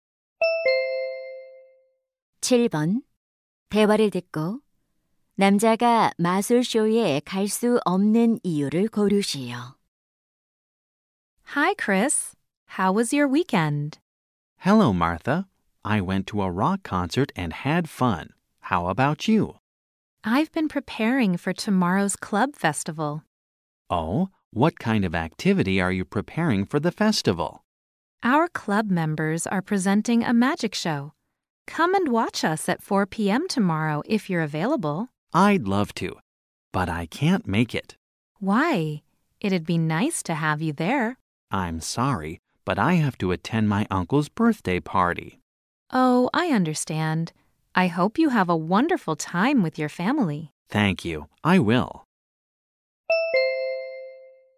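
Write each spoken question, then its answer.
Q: 남자가 마술쇼에 갈 수 없는 이유를 고르시오.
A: 삼촌의 생일 파티에 가야 해서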